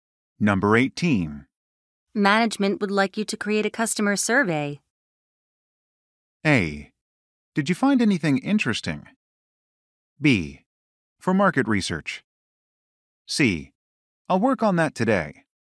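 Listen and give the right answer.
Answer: C: I'll work on that today.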